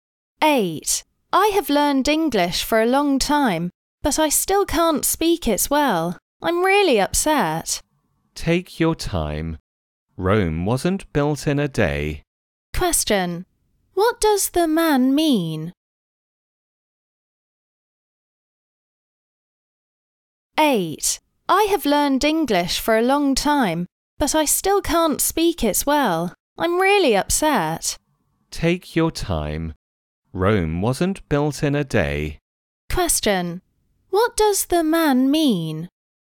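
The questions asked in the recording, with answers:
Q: What does the man mean?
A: Learning English well takes time; be patient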